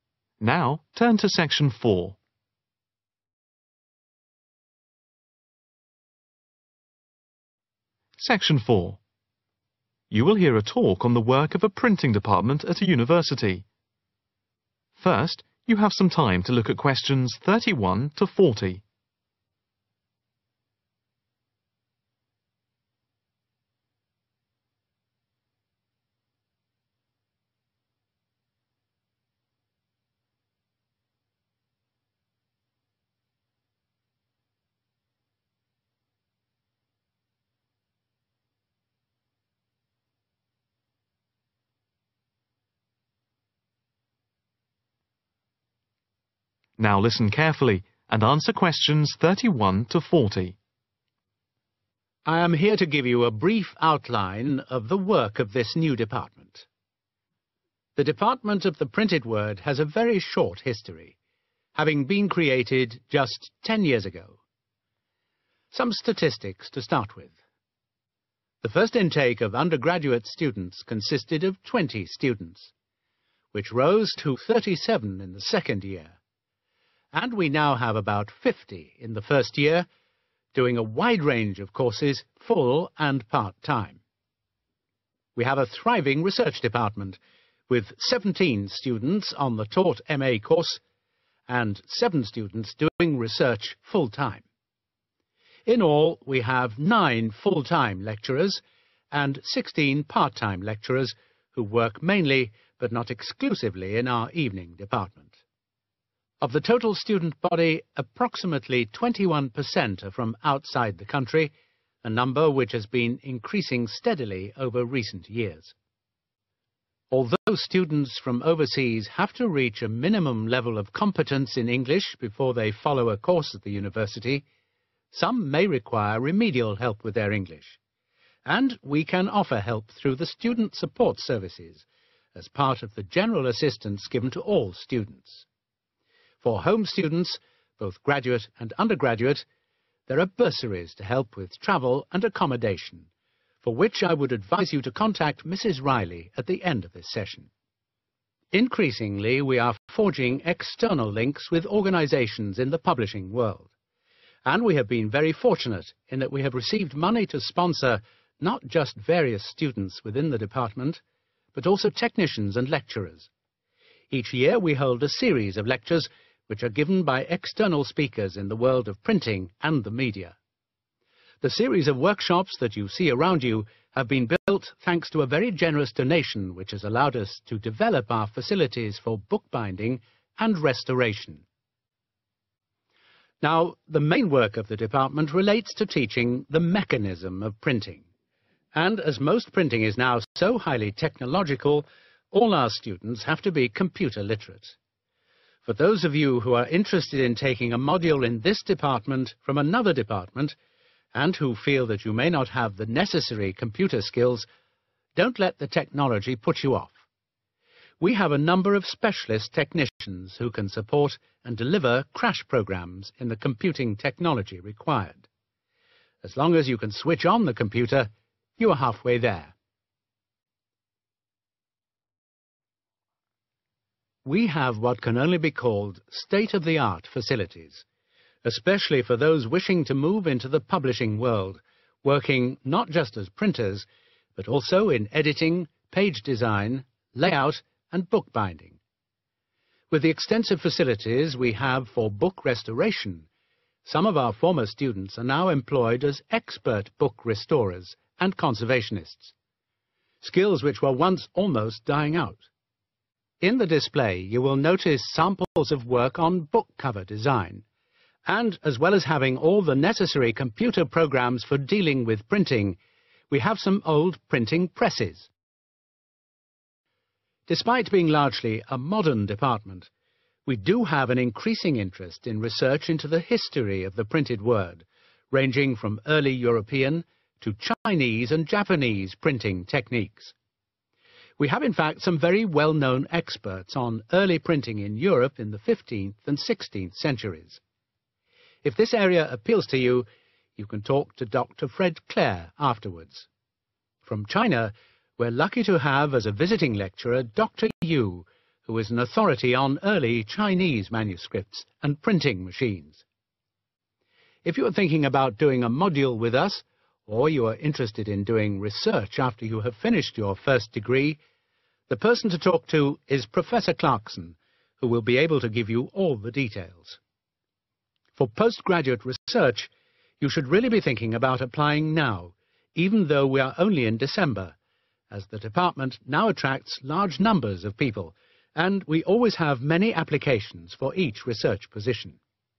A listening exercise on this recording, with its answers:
Complete the notes below. Write NO MORE THAN THREE WORDS AND/OR A NUMBER for each answer.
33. sponsorship of students, technicians and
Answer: lecturers